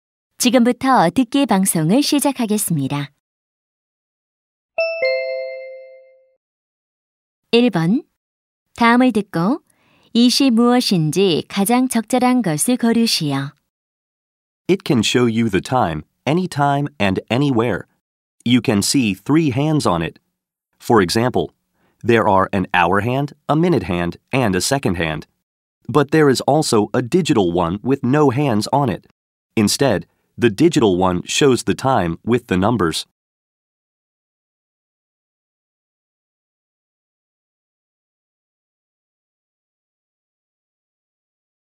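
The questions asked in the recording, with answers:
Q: 다음을 듣고 이시 무엇인지 가장 적절한 것을 고르시오.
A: 시계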